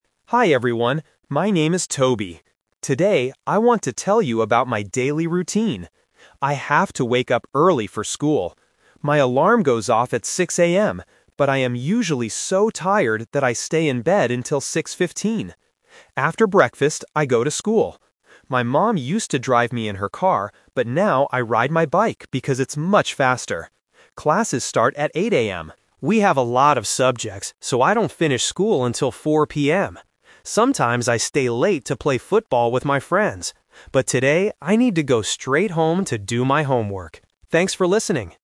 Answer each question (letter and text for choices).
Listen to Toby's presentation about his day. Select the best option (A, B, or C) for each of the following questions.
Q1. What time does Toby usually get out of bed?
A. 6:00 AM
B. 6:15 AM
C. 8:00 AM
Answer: B. 6:15 AM

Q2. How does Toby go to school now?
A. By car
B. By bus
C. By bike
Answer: C. By bike

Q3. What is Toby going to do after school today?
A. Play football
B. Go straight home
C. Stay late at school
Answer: B. Go straight home

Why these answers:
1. Toby says he is tired, so he stays in bed until 6:15. Why the traps are wrong: Option (A) is "The Trap". His alarm goes off at 6:00 AM, but he doesn't get up at that time. Option (C) is a "Number Trap"; 8:00 AM is the time his classes start.
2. Toby clearly says, "...but now I ride my bike because it's much faster." Why the traps are wrong: Option (A) is "The Twist Trap". His mom used to drive him in her car, but he doesn't do that anymore. Option (B) is a plausible way to get to school, but it is not mentioned in the audio.
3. Toby states his plan for today: "...but today I need to go straight home to do my homework." Why the traps are wrong: Option (A) and Option (C) are "The Twist Traps". He sometimes stays late to play football, but today he is not doing that.

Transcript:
Toby: Hi everyone, my name is Toby. Today I want to tell you about my daily routine. I have to wake up early for school. My alarm goes off at 6:00 AM, but I am usually so tired that I stay in bed until 6:15. After breakfast, I go to school. My mom used to drive me in her car, but now I ride my bike because it's much faster. We have a lot of subjects, so I don't finish school until 4:00 PM. Sometimes I stay late to play football with my friends, but today I need to go straight home to do my homework. Thanks for listening!